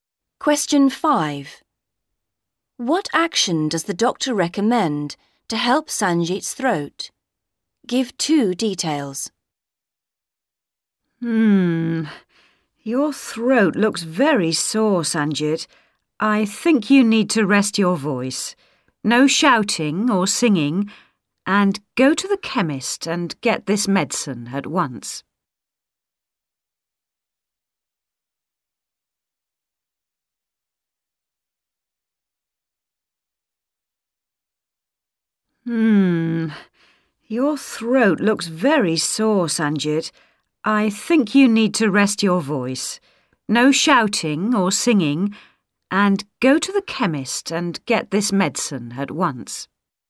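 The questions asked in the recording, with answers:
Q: What action does the doctor recommend to help Sanjit's throat?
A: Rest his voice (no shouting or singing) and get medicine from the chemist at once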